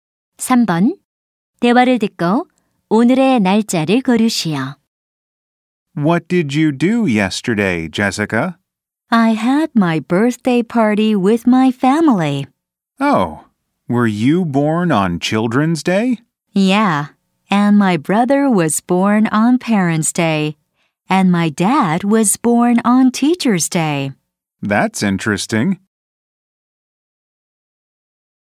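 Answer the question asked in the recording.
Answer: 5월 6일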